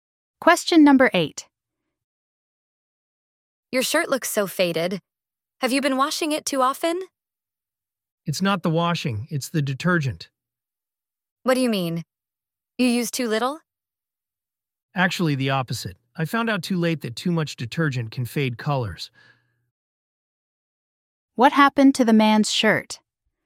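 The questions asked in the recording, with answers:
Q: What happened to the man's shirt?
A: It faded from using too much detergent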